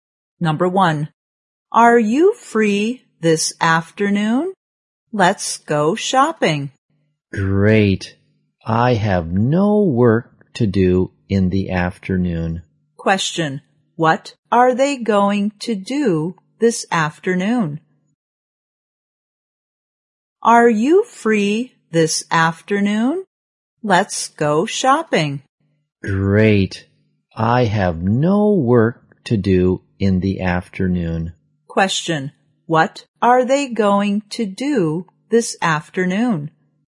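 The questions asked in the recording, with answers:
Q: what are they going to do this afternoon?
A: Go shopping.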